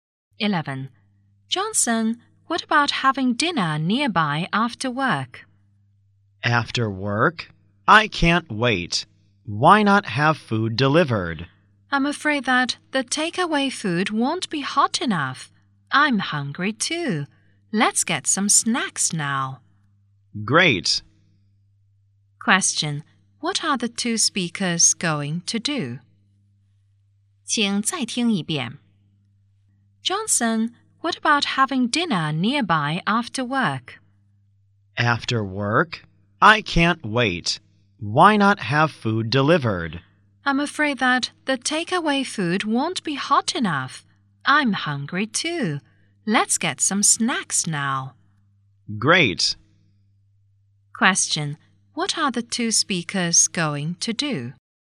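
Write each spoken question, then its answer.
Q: Question: what are the two speakers going to do?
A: Get some snacks now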